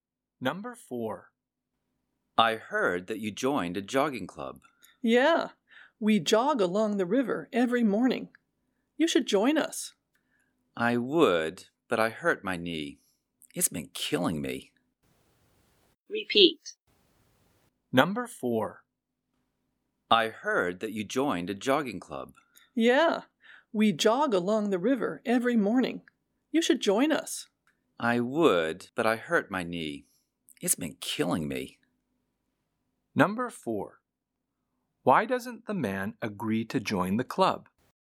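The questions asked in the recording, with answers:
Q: Why doesn't the man agree to join the club?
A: He hurt his knee.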